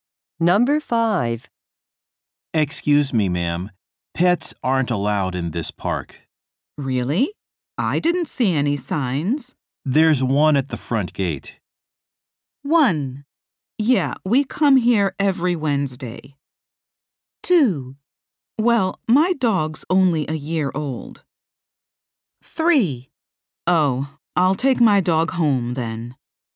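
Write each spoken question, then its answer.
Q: There's one at the front gate.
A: 3: Oh, I'll take my dog home then.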